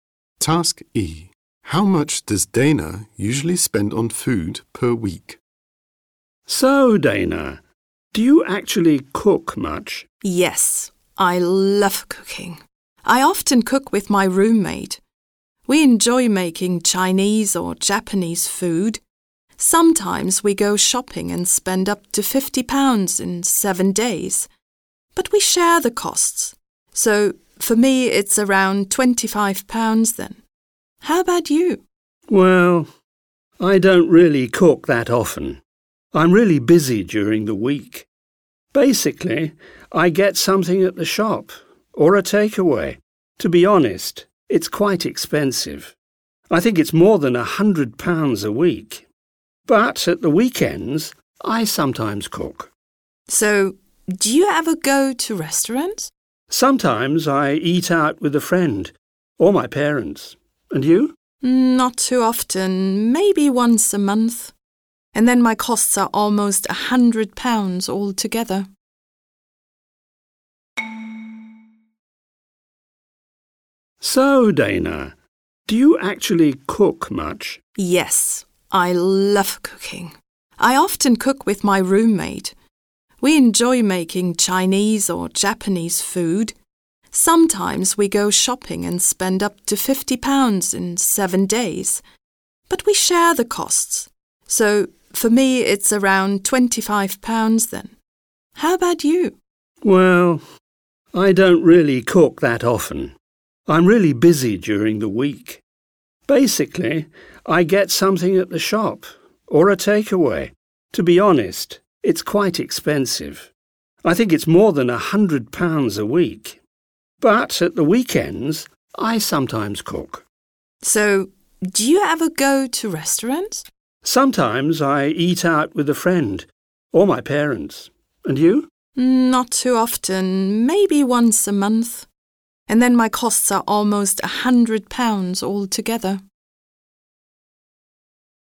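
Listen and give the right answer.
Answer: Around £25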